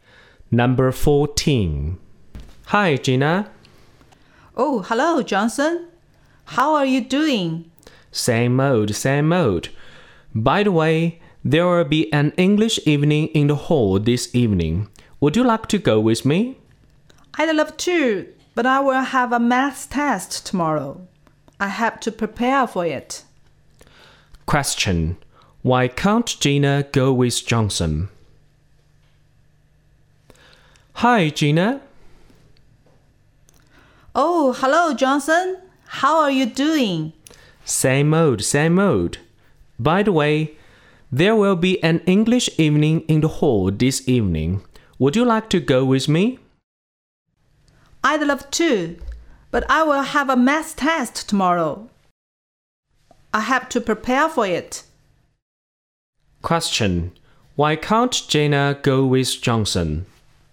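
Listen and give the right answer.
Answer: She has to prepare for a math test tomorrow.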